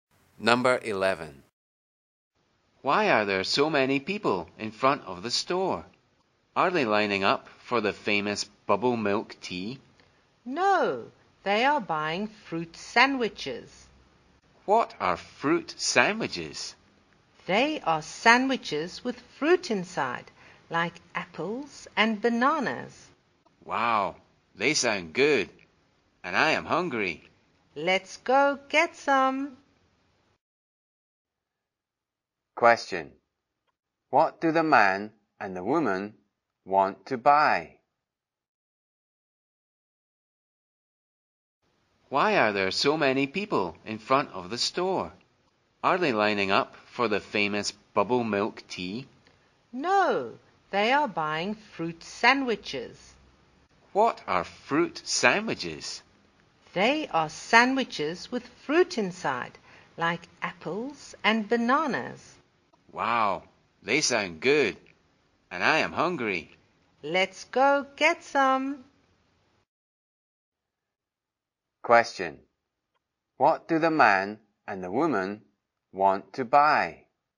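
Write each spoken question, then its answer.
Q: Question. What do the man and the woman want to buy?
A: Fruit sandwiches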